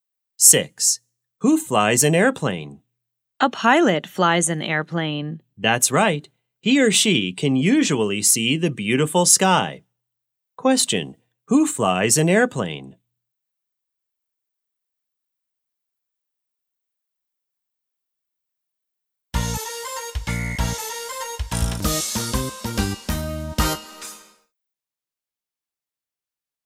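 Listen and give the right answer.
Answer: A pilot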